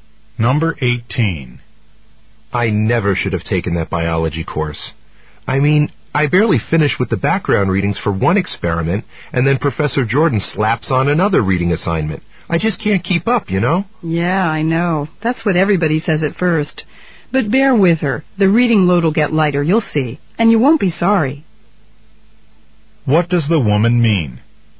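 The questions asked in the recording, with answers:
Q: What does the woman mean?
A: The reading load will get lighter and the course will be worth it.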